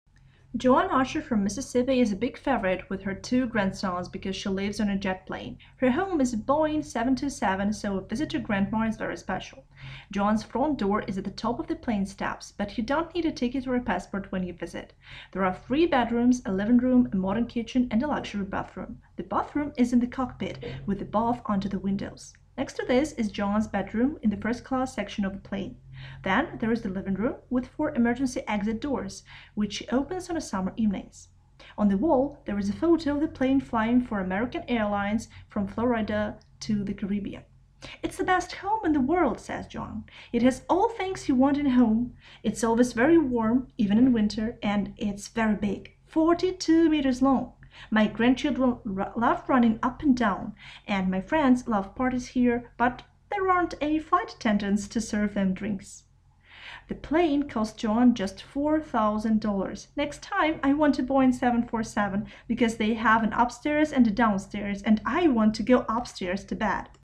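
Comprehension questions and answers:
Вы услышите разговор в магазине подарков. Для каждого предложения выберите из выпадающего списка концовку, соответствующую содержанию разговора. К каждому предложению подходит только одна концовка.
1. Joanne`s grandchildren like to visit her because _________.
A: she lives on a jet plane

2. Joanne opens four doors _________.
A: on summer evenings

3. The plane flew _________.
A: from Florida to the Caribbean

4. The plane is _________.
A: 42 meters long

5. Joanne wants a Boeing 747 because _________.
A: it has an upstairs and a downstairs

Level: 7 класс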